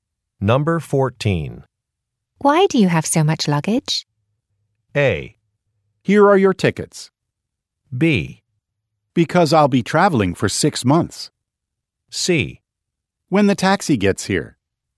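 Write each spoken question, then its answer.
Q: Why do you have so much luggage?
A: B: Because I'll be traveling for 6 months.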